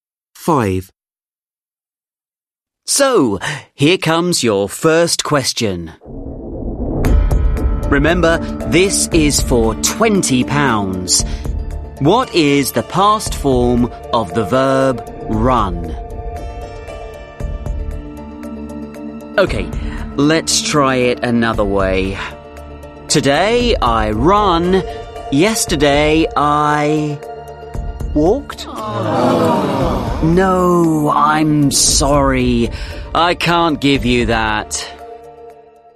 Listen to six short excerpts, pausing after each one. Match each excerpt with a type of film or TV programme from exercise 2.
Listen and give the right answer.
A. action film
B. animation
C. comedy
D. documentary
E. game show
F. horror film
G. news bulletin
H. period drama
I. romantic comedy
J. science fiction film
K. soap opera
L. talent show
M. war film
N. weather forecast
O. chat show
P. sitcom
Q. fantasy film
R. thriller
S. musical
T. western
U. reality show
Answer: E. game show

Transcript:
5. Host: So, here comes your first question. Remember, this is for £20. What is the past form of the verb 'run'? OK, let's try it another way. Today, I run. Yesterday, I ...
Man: Walked?
Host: No, I'm sorry. I can't give you that.

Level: Lớp 10